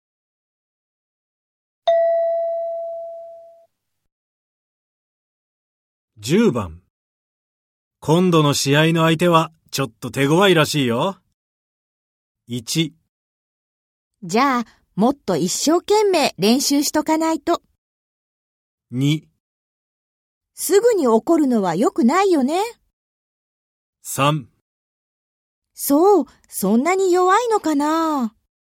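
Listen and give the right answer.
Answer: 1: じゃあ、もっと一生懸命練習しとかないと。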